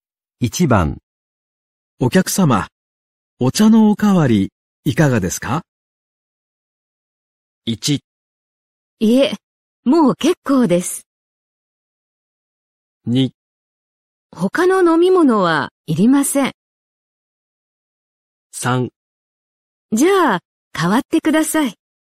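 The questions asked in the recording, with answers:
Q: お客様、お茶のおかわりいかがですか?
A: 1: いえ、もう結構です。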